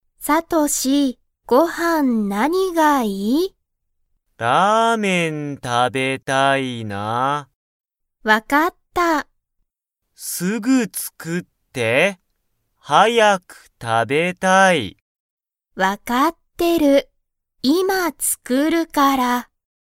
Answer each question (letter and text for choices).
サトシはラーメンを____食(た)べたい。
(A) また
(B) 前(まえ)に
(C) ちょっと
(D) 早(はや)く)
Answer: (D) 早(はや)く)

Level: Level 1